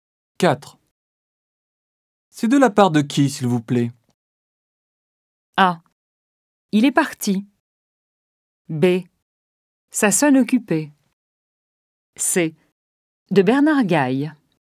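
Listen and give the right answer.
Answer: C: De Bernard Gaille.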